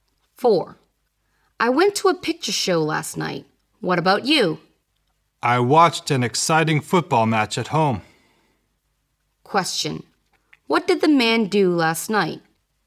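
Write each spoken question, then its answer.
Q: What did the man do last night?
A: He watched a football match at home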